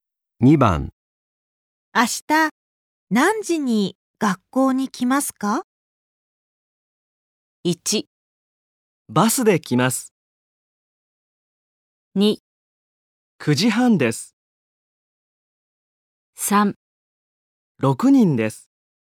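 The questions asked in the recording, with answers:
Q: 明日何時に学校に来ますか?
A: 2: 9時半です。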